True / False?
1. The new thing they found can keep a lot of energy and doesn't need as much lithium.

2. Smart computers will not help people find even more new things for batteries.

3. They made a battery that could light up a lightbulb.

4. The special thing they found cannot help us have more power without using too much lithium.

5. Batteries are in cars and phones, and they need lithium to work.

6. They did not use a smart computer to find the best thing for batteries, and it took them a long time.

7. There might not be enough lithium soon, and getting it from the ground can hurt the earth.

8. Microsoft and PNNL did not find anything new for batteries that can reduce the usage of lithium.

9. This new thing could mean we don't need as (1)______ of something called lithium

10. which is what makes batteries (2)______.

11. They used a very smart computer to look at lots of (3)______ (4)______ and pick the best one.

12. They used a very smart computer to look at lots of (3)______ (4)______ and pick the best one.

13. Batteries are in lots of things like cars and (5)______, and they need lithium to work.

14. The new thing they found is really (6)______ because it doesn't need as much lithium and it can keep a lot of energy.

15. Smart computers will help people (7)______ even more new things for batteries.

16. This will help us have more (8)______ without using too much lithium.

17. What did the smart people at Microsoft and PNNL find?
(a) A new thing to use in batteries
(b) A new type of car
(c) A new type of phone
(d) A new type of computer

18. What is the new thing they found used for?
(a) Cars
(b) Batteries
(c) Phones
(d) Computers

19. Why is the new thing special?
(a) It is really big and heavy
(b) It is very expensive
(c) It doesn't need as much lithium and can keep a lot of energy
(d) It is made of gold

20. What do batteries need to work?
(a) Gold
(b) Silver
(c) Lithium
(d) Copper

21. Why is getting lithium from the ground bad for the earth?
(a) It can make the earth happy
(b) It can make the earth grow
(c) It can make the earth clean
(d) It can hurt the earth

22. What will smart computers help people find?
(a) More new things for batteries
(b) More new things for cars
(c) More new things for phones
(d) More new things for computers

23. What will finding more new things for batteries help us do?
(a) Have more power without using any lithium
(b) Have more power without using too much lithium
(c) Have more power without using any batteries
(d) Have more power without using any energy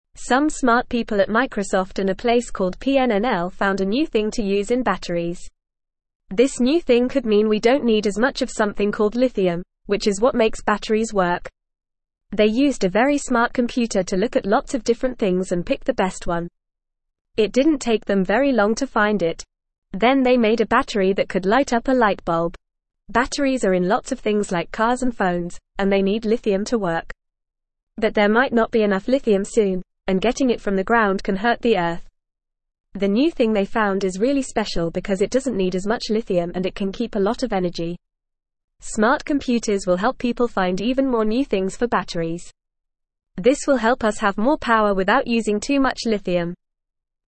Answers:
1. True
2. False
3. True
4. False
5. True
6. False
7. True
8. False
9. much
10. work
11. different
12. things
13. phones
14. special
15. find
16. power
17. a
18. b
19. c
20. c
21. d
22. a
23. b

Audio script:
Some smart people at Microsoft and a place called PNNL found a new thing to use in batteries. This new thing could mean we don't need as much of something called lithium, which is what makes batteries work. They used a very smart computer to look at lots of different things and pick the best one. It didn't take them very long to find it. Then they made a battery that could light up a lightbulb.
Batteries are in lots of things like cars and phones, and they need lithium to work. But there might not be enough lithium soon, and getting it from the ground can hurt the earth. The new thing they found is really special because it doesn't need as much lithium and it can keep a lot of energy. Smart computers will help people find even more new things for batteries. This will help us have more power without using too much lithium.

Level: Level 1

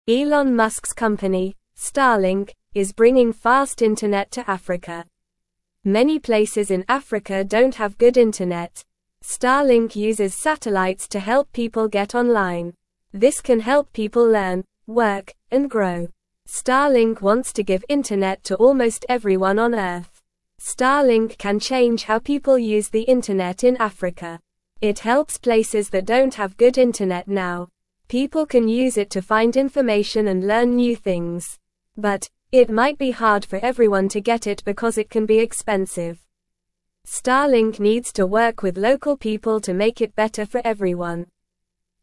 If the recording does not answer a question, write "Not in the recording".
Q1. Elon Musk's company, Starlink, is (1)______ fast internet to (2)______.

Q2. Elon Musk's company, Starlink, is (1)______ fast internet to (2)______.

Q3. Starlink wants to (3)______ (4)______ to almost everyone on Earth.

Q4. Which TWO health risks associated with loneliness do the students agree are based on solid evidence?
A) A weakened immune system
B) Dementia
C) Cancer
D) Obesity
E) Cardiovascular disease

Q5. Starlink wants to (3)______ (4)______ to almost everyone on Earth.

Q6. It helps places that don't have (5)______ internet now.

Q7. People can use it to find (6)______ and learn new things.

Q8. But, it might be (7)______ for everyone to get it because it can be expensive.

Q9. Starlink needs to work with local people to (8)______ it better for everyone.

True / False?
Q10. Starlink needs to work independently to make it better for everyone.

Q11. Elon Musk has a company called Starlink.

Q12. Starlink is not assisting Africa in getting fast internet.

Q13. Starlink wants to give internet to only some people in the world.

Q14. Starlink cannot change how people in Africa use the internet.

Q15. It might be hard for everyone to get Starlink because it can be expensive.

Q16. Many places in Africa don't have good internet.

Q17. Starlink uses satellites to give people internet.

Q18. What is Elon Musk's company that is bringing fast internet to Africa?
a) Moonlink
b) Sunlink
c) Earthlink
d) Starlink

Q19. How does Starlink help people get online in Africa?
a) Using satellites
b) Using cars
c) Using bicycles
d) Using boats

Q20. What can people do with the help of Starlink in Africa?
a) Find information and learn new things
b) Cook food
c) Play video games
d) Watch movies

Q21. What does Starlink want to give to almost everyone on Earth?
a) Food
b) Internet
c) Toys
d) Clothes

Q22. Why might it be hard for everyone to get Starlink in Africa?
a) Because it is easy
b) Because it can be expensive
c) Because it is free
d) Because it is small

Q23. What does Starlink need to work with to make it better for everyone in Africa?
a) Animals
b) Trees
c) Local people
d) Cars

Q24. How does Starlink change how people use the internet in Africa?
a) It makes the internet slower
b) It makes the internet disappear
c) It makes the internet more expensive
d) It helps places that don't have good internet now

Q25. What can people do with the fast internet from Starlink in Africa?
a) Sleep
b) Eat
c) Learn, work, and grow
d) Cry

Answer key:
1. bringing
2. Africa
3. give
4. Not in the recording
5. internet
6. good
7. information
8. hard
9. make
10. False
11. True
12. False
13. False
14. False
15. True
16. True
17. True
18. d
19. a
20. a
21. b
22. b
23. c
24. d
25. c

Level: Level 1

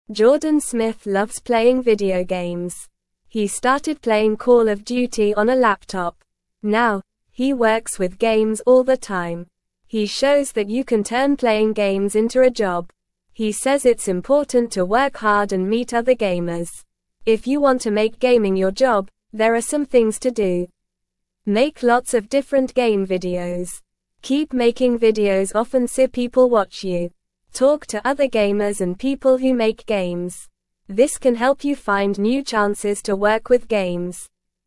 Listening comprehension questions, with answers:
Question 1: How did Jordan start playing video games?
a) On a laptop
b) On a phone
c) On a TV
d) On a tablet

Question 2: What does Jordan say is important if you want to make gaming your job?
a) Work hard and meet other gamers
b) Sleep all day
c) Watch TV all day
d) Eat candy all day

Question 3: What should you do to make gaming your job?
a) Read books all day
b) Go for a walk all day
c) Clean your room all day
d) Make lots of different game videos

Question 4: How often should you make videos if you want people to watch you?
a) Never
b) Sometimes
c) Often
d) Rarely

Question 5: Who should you talk to if you want to work with games?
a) Your pets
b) Other gamers and people who make games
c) Strangers on the street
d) Your toys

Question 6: How can talking to other gamers and people who make games help you?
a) Find new chances to watch TV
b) Find new chances to work with games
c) Find new chances to sleep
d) Find new chances to eat candy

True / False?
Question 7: Keep making videos often so people watch you.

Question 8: He stopped playing Call of Duty on a laptop.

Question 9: Now, he rarely works with games.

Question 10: It's important to work hard if you want to make gaming your job.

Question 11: He demonstrates that you cannot transform playing games into a job.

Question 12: Jordan Smith dislikes playing video games.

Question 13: Make lots of different game videos if you want to work with games.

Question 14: Talking to other gamers and game makers can help you find new job opportunities.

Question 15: How did Jordan start playing Call of Duty?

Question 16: What should you do if you want to make gaming your job?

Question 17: How can talking to other gamers and game makers help you?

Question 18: Jordan Smith loves playing video (1)______.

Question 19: He started playing Call of Duty on a (2)______.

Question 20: He shows that you can turn (3)______ games into a job.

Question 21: He says it's (4)______ to work hard and meet other gamers.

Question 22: If you (5)______ to make gaming your job, there are some things to do.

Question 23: (6)______ lots of different game videos.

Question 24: Talk to other gamers and people who (7)______ games.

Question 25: This can help you find new chances to (8)______ with games.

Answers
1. a
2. a
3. d
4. c
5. b
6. b
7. True
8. False
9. False
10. True
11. False
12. False
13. True
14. True
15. Jordan started playing Call of Duty on a laptop.
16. If you want to make gaming your job, you should make lots of different game videos and talk to other gamers and game makers.
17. Talking to other gamers and game makers can help you find new opportunities to work with games and grow your career.
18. games
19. laptop
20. playing
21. important
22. want
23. Make
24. make
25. work

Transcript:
Jordan Smith loves playing video games. He started playing Call of Duty on a laptop. Now, he works with games all the time. He shows that you can turn playing games into a job. He says it's important to work hard and meet other gamers.
If you want to make gaming your job, there are some things to do. Talk to other gamers and people who make games. This can help you find new chances to work with games.

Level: Level 1

